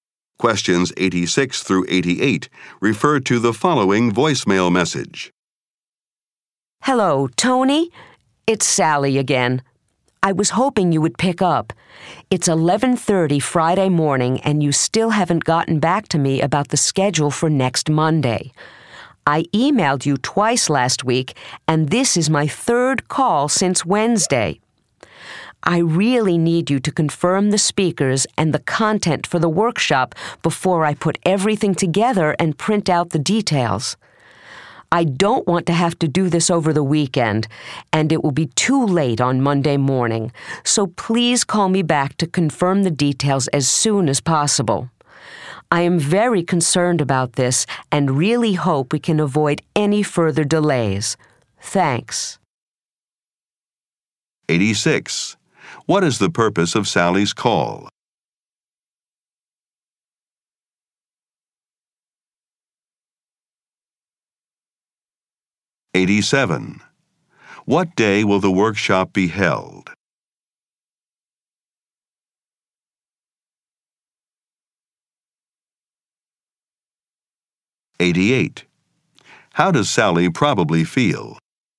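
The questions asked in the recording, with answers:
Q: What is the purpose of Sally's call?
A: To ask Tony to confirm the workshop speakers and content

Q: What day will the workshop be held?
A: Monday

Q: How does Sally probably feel?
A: Worried and frustrated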